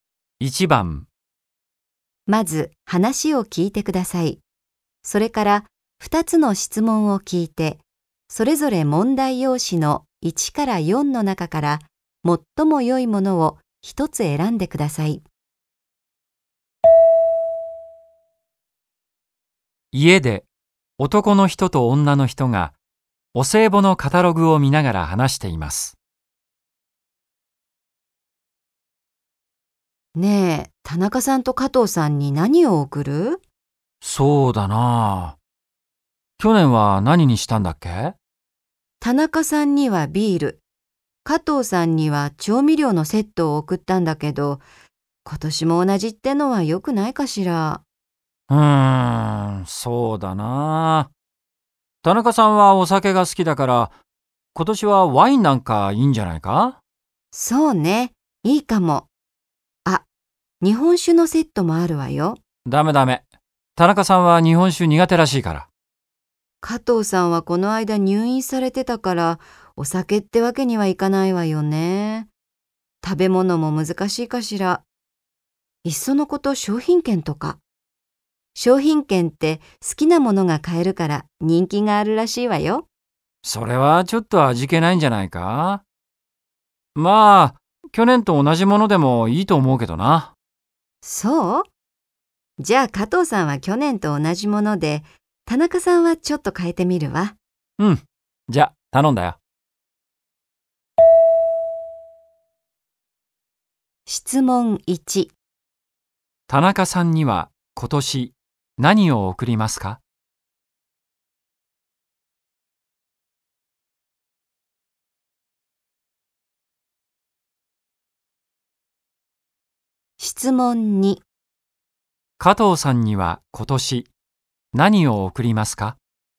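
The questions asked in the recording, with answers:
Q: 田中さんには今年何を贈りますか?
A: ワイン

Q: 加藤さんには今年何を贈りますか?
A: 調味料のセット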